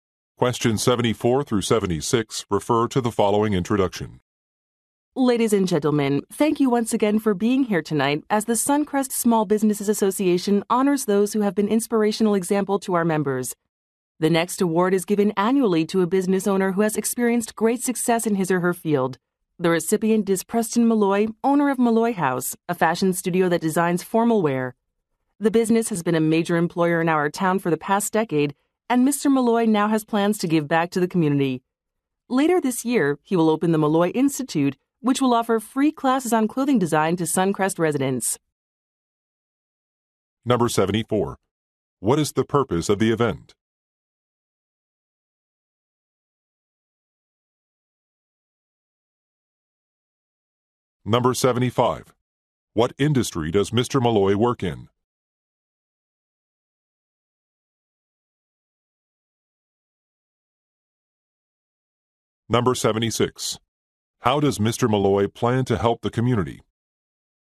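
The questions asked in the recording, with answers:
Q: What is the purpose of the event?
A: To honor inspirational business owners with awards

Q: What industry does Mr. Malloy work in?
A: Fashion (formal wear design)

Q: How does Mr. Malloy plan to help the community?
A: By offering free clothing design classes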